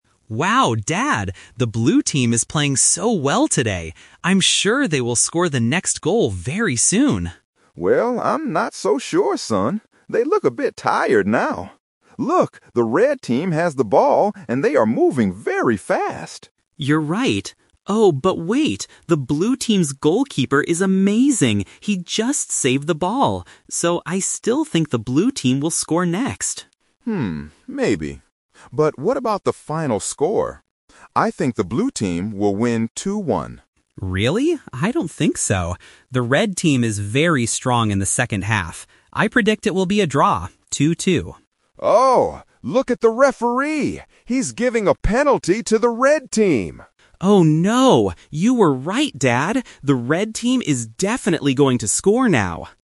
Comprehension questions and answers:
Listen to the conversation between a father and his child and choose the best answer (A, B, or C).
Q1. Who does the son think will score the next goal at first?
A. The Red Team.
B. The Blue Team.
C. Neither team.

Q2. What is the son's prediction for the final score?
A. 2 - 1.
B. 1 - 2.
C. 2 - 2.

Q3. What happens at the end of the conversation?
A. The Blue Team scores a goal.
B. The Red Team gets a penalty.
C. The referee ends the match.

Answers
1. B
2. C
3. B

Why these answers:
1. The son says, "I still think the Blue Team will score next" after seeing the goalkeeper's performance.
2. The son explicitly predicts a draw: "I predict it will be a draw, 2-2."
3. At the very end, the father shouts, "He's giving a penalty to the Red Team!"

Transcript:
Son: Wow, Dad! The Blue Team is playing so well today. I'm sure they will score the next goal very soon.
Father: Well, I'm not so sure, son. They look a bit tired now. Look! The Red Team has the ball and they are moving very fast.
Son: You're right. Oh, but wait! The Blue Team's goalkeeper is amazing. He just saved the ball! So, I still think the Blue Team will score next.
But what about the final score? I think the Blue Team will win 2-1.
Son: Really? I don't think so. The Red Team is very strong in the second half. I predict it will be a draw, 2-2.
Father: Oh! Look at the referee! He's giving a penalty to the Red Team!
Son: Oh no! You were right, Dad. The Red Team is definitely going to score now.

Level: A2

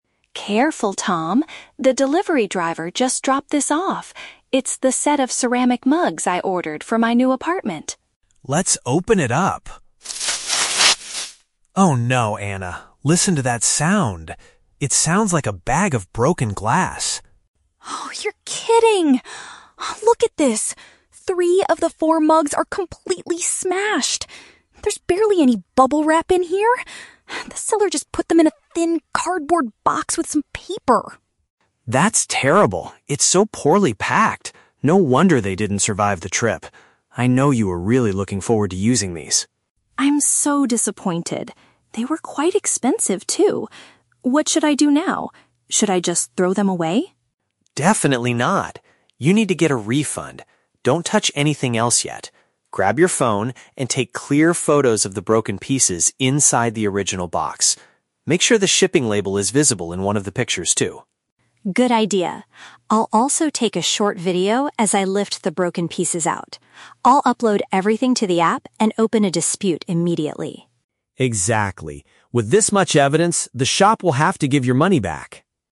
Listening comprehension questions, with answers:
Listen to a conversation between two friends and choose the best answer (A, B, or C) for each question.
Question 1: What is the initial problem when the friends open the package?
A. The delivery driver brought the wrong set of kitchen items.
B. Most of the ceramic products inside are broken into pieces.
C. The box is empty because the items were stolen during shipping.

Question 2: According to Anna, why did the damage most likely happen?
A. The material used to make the mugs was too thin and cheap.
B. The delivery driver accidentally dropped the box on the stairs.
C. The seller did not use enough protective materials for the fragile items.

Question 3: What does Tom advise Anna to do before throwing the broken mugs away?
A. Contact the post office to complain about the driver's behavior.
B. Use her mobile device to record visual proof of the damaged goods.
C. Try to glue the broken pieces back together to save money.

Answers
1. B
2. C
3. B

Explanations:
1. Tom says it "sounds like a bag of broken glass" and Anna confirms "Three of the four mugs are completely smashed." Option B paraphrases "smashed" as "broken into pieces." Why the trap is wrong: Option (A) is not mentioned. Option (C) is a trap; the items are there, just not in one piece.
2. Anna points out, "There's barely any bubble wrap in here" and says they were put in a "thin cardboard box." Option C uses "did not use enough protective materials" to describe the lack of bubble wrap and thin box. Why the trap is wrong: Option (A) is not mentioned. Option (B) is a trap; Anna mentions the driver "dropped this off," but she blames the "poorly packed" box for the damage.
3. Tom tells her to "take clear photos" and Anna adds she will "take a short video." Option B paraphrases this as using a "mobile device to record visual proof." Why the trap is wrong: Option (A) is a plausible action but Tom specifically focuses on getting "evidence" for a refund from the shop. Option (C) is the opposite of what they should do.

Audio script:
Anna: Careful, Tom! The delivery driver just dropped this off. It's the set of ceramic mugs I ordered for my new apartment.
Tom: Let's open it up... Oh no, Anna. Listen to that sound. It sounds like a bag of broken glass.
Anna: Oh, you're kidding! Look at this! Three of the four mugs are completely smashed. There's barely any bubble wrap in here. The seller just put them in a thin cardboard box with some paper.
Tom: That's terrible. It's so poorly packed! No wonder they didn't survive the trip. I know you were really looking forward to using these.
Anna: I'm so disappointed. They were quite expensive, too. What should I do now? Should I just throw them away?
Tom: Definitely not! You need to get a refund. Don't touch anything else yet. Grab your phone and take clear photos of the broken pieces inside the original box. Make sure the shipping label is visible in one of the pictures, too.
Anna: Good idea. I'll also take a short video as I lift the broken pieces out. I'll upload everything to the app and open a dispute immediately.
Tom: Exactly. With this much evidence, the shop will have to give your money back.

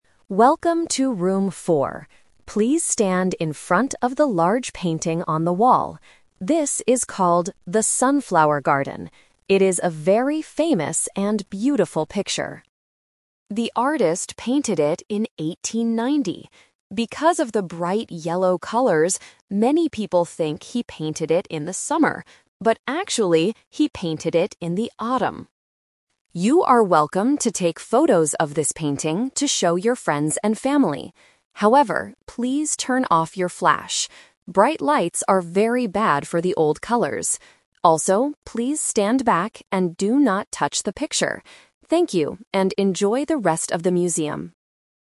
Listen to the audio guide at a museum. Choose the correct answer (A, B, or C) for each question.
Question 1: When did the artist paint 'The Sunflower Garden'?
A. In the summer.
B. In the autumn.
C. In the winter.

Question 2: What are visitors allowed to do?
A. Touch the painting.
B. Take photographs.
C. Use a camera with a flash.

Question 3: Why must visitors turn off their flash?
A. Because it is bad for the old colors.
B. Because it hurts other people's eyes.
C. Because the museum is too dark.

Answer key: 1B, 2B, 3A

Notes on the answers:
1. This is The Twist structure. The recording says that many people think the painting was painted in summer, "But actually, he painted it in autumn." Answer (A) is a common-sense trap. Answer (C) is not mentioned.
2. The voiceover announces: "You are welcome to take photos of this painting..." Answer (A) is a trap because the recording forbids this ("do not touch"). Answer (C) is also a trap because the recording asks "turn off your flash."
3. The recording explains the reason for forbidding flash: "Bright lights are very bad for the old colors." Answers (B) and (C) are reasons that seem plausible in real life, but are not mentioned in the listening passage.

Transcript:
Audio Guide: Welcome to Room 4. Please stand in front of the large painting on the wall. This is called 'The Sunflower Garden'. It is a very famous and beautiful picture.
The artist painted it in 1890. Because of the bright yellow colors, many people think he painted it in the summer. But actually, he painted it in the autumn.
You are welcome to take photos of this painting to show your friends and family. However, please turn off your flash. Bright lights are very bad for the old colors. Also, please stand back and do not touch the picture. Thank you, and enjoy the rest of the museum.

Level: A2

